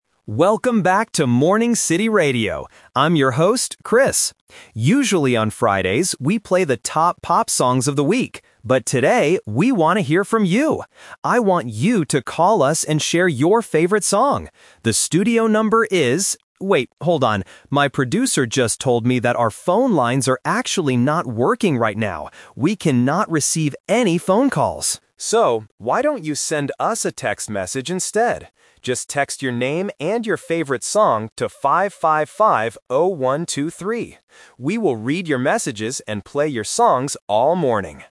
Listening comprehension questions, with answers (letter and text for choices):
Listen to the radio host and choose the correct answer (A, B, or C).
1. What does the radio host want the listeners to do today?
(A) Listen to the top pop songs.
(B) Share their favorite song.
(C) Call the show's producer.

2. Why can't the listeners call the radio station?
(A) Because the host is too busy.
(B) Because the radio show is over.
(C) Because the phone lines are broken.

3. How should the listeners contact the radio station now?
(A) By sending a text message.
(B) By sending an email.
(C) By calling a new phone number.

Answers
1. (B) Share their favorite song.
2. (C) Because the phone lines are broken.
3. (A) By sending a text message.

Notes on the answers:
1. The host clearly says, "I want you to call us and share your favorite song." Option A is the Trap (playing top pop songs is what they usually do on Fridays, but not today). Option C is not mentioned as a task for the listeners.
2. The host says, "our phone lines are actually not working right now" (which means they are broken). Option A and Option B are incorrect and not mentioned in the audio.
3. This is The Twist. Because the phones are broken, the host suggests: "So, why don't you send us a text message instead?" Option C is the Trap (he gives the number 555-0123, but it is for texting, not calling). Option B is not mentioned.

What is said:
Radio Host: Welcome back to Morning City Radio! I'm your host, Chris. Usually, on Fridays, we play the top pop songs of the week. But today, we want to hear from you! I want you to call us and share your favorite song. The studio number is... wait, hold on. My producer just told me that our phone lines are actually not working right now. We cannot receive any phone calls. So, why don't you send us a text message instead? Just text your name and your favorite song to 555-0123. We will read your messages and play your songs all morning!

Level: A2